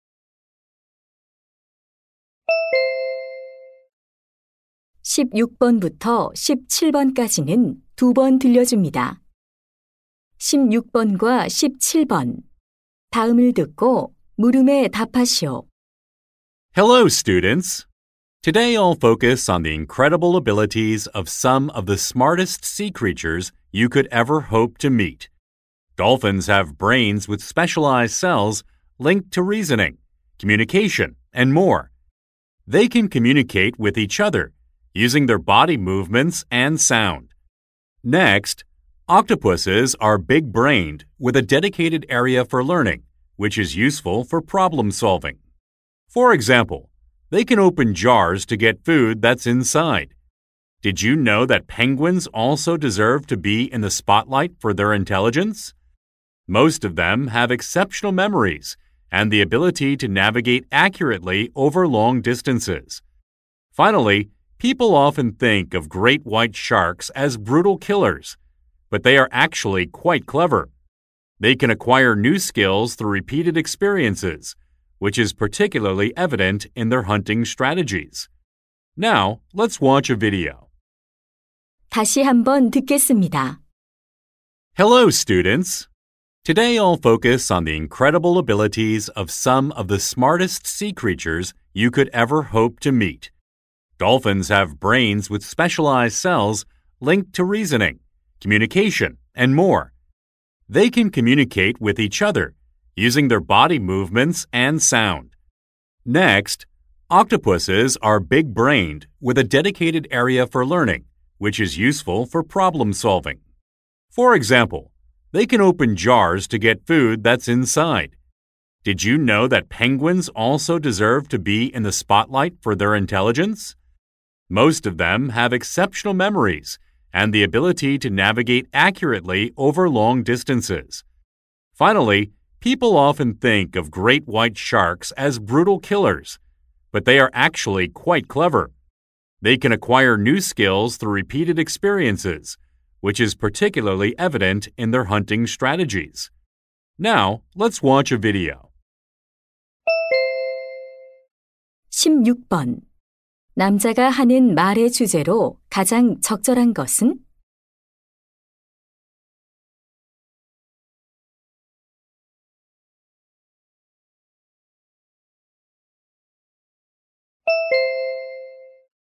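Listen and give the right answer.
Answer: 가장 똑똑한 해양 동물들의 놀라운 능력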